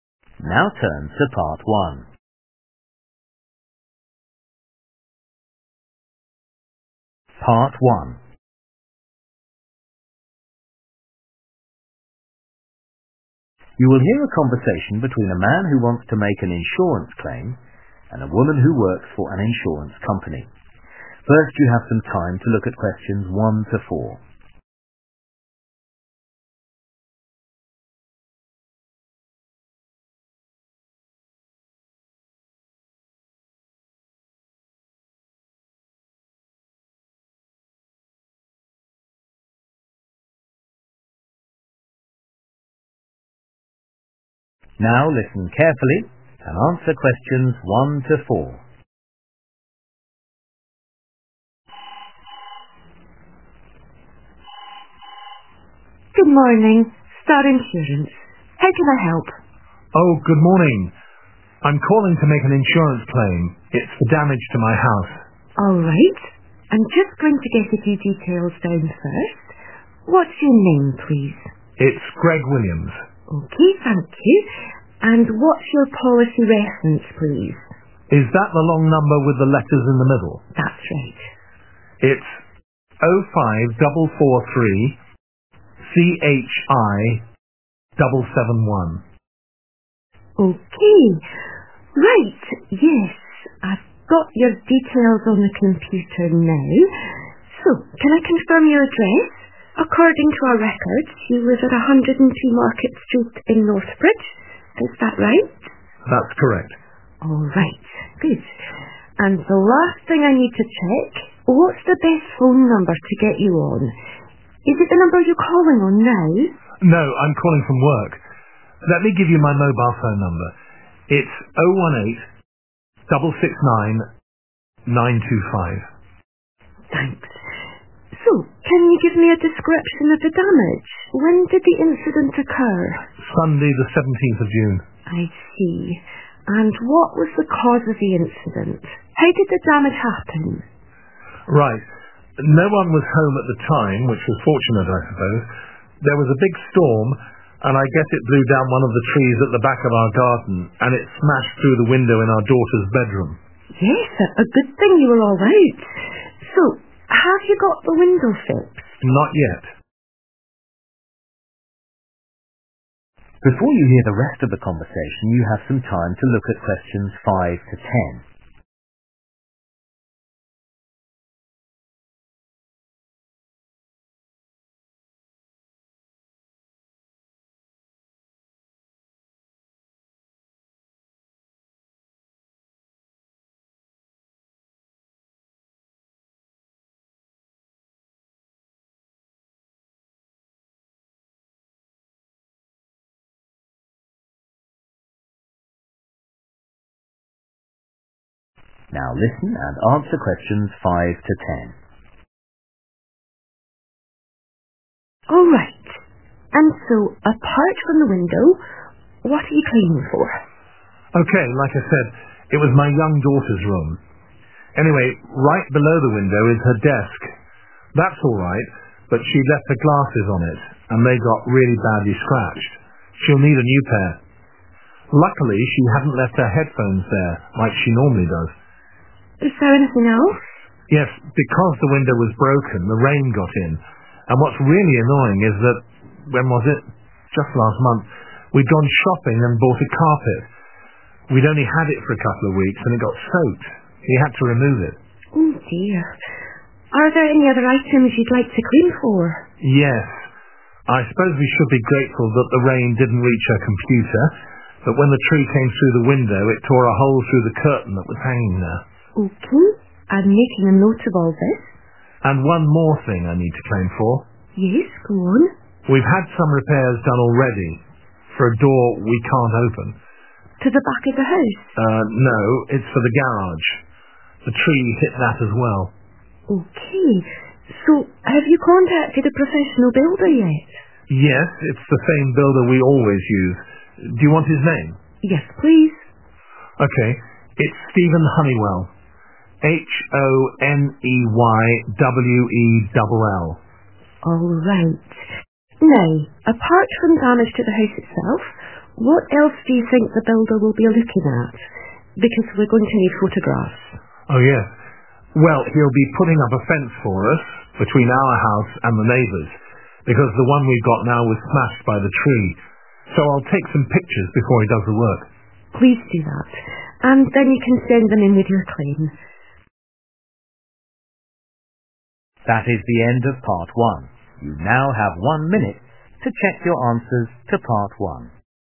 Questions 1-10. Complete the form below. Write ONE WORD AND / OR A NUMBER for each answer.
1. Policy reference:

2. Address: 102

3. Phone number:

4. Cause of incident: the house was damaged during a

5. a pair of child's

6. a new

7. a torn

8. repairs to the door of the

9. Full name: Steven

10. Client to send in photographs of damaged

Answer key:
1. 05443CHI771
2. Market
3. 018669925
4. storm
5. glasses
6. carpet
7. curtain
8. garage
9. Honeywell
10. fence

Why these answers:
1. Oh, 05443CHI771 [À, 05443CHI77]
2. According to our records, you live at 102 Market street in North Bridge. [Theo hồ sơ của chúng tôi, bạn sống ở số 102 đường Market ở North Bridge]
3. It's 01866925. [Là 01866925]
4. There was a big storm and I guess it blew down one of the trees at the back of our garden and it smashed through the window in our daughter's bedroom. [Có một cơn bão lớn và tôi đoán nó đã thổi bay một trong những cái cây ở phía sau khu vườn của chúng tôi và đập vỡ cửa sổ trong phòng ngủ con gái chúng tôi]
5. But she left her glasses on it and they got really badly scratched. [Nhưng con bé đã để quên kính của mình trên đó và chúng bị xước rất nặng]